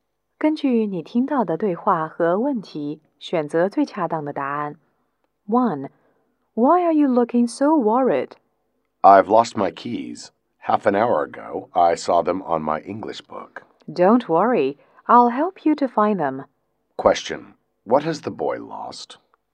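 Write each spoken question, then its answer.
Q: What has the boy lost?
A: His keys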